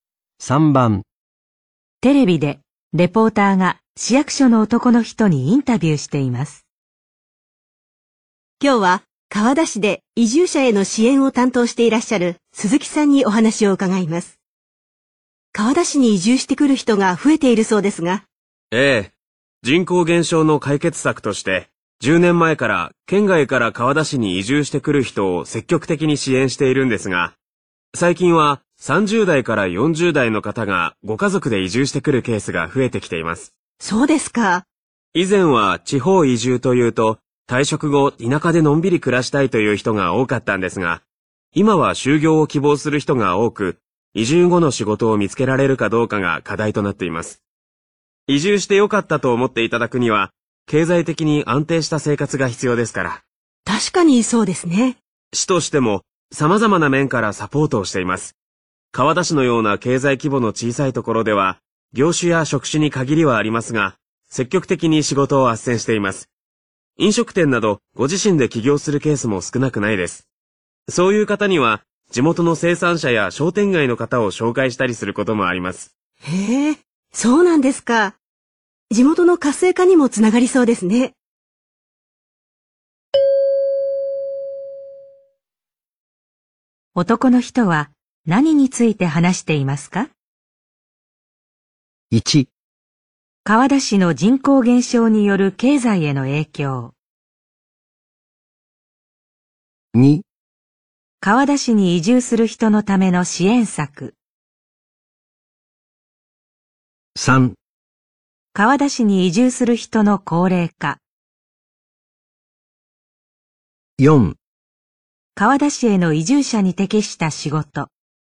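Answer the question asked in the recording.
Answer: 2: 川田市に移住する人のための支援策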